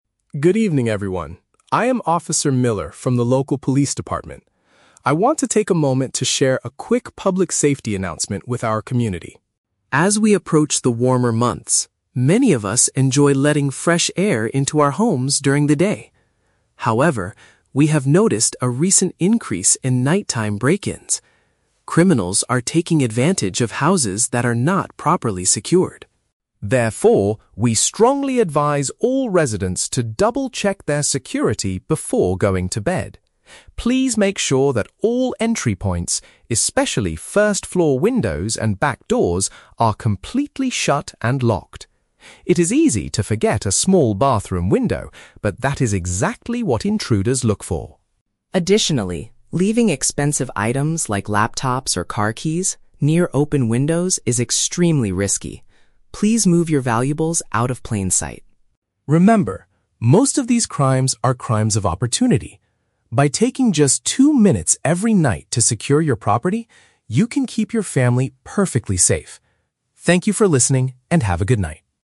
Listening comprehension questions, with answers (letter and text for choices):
Listen to a public safety announcement from a police officer and choose the correct answer (A, B, or C) for each question.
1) What is the main purpose of this announcement?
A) To report a recent increase in serious traffic accidents.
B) To advise citizens on how to protect their houses at night.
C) To teach people how to install new locks on their doors.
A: B) To advise citizens on how to protect their houses at night.

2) According to Officer Miller, what mistake do residents often make?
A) They fail to secure certain windows before going to sleep.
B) They keep their car keys hidden inside the bathroom.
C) They leave their front doors wide open during the winter.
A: A) They fail to secure certain windows before going to sleep.

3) What does the officer say about valuable items?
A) They must be locked inside a heavy metal safe.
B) They should be left near the window to scare the thieves.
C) They should be moved away from areas where people can easily see them.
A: C) They should be moved away from areas where people can easily see them.

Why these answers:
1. The Key: The officer advises residents to "double-check their security before going to bed" to prevent "nighttime break-ins." This means he is advising them on how to protect their houses at night. The Trap (C): The officer talks about making sure things are "locked," but he does not teach people how to install new locks. Plausible but not mentioned (A): Reporting traffic accidents is a common police announcement, but it is not the topic of this audio.
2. The Key: The officer says, "It is easy to forget a small bathroom window." Forgetting to shut a window means failing to secure it. The Trap (B): The audio mentions "car keys" and a "bathroom window", but the officer does not say people hide their keys in the bathroom. He says leaving keys near open windows is risky. Plausible but not mentioned (C): Leaving doors open is a mistake, but the officer talks about the "warmer months" (summer), not the winter.
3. The Key: The officer says, "Please move your valuables out of plain sight." "Out of plain sight" means hiding them or moving them away from areas where people can easily see them. The Trap (B): The audio mentions leaving items "near open windows", but the officer says this is "extremely risky," not a good way to scare thieves. Plausible but not mentioned (A): Putting valuables in a metal safe is a great security measure, but the officer does not specifically suggest buying or using a safe.

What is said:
Officer Miller: Good evening, everyone. I am Officer Miller from the local police department. I want to take a moment to share a quick public safety announcement with our community.
As we approach the warmer months, many of us enjoy letting fresh air into our homes during the day. However, we have noticed a recent increase in nighttime break-ins. Criminals are taking advantage of houses that are not properly secured.
Therefore, we strongly advise all residents to double-check their security before going to bed. Please make sure that all entry points, especially first-floor windows and back doors, are completely shut and locked. It is easy to forget a small bathroom window, but that is exactly what intruders look for.
Additionally, leaving expensive items, like laptops or car keys, near open windows is extremely risky. Please move your valuables out of plain sight.
Remember, most of these crimes are crimes of opportunity. By taking just two minutes every night to secure your property, you can keep your family perfectly safe. Thank you for listening, and have a good night.